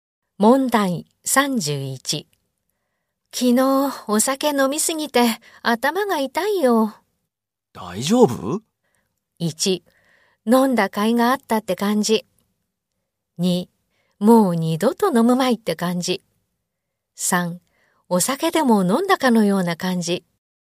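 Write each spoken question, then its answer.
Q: 昨日お酒飲みすぎて頭が痛いよ。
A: 2: もう二度と飲むまいって感じ。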